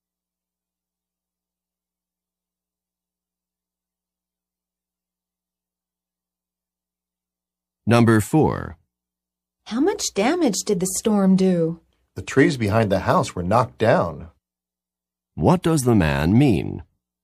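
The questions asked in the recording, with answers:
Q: What does the man mean?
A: The storm knocked down the trees behind the house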